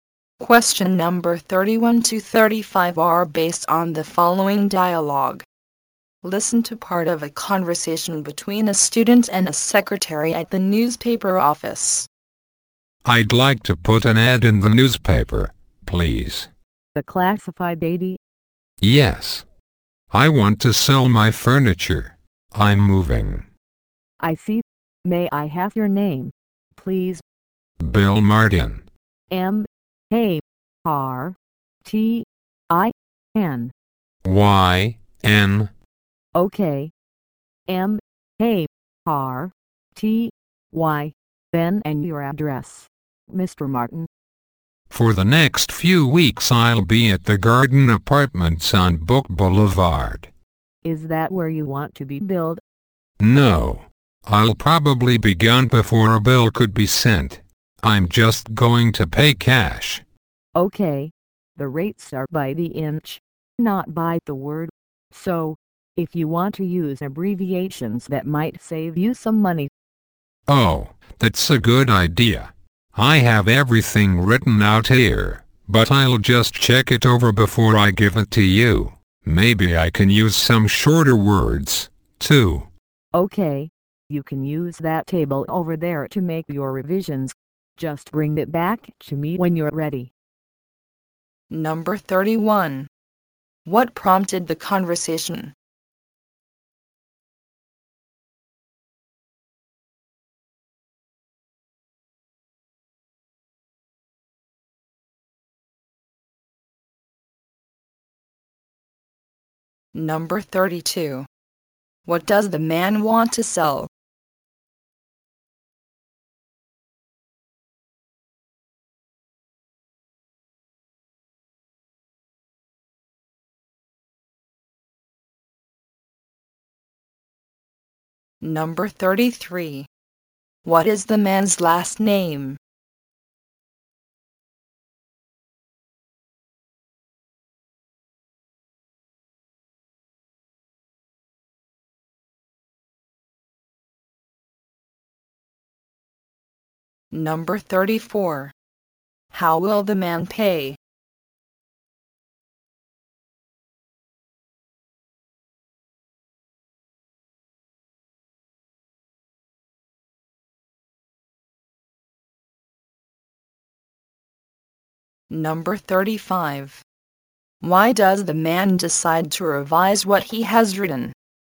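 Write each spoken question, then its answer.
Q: What does the man want to sell?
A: His furniture.

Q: What is the man's last name?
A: Martyn (M-A-R-T-Y-N).

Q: How will the man pay?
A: In cash.

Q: Why does the man decide to revise what he has written?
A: To save money, because rates are by the inch.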